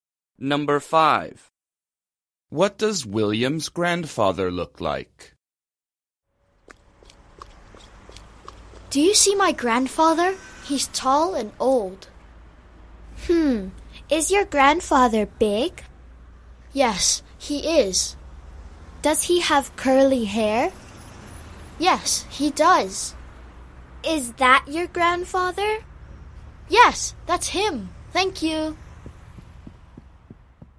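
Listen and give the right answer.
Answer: Tall, old and big with curly hair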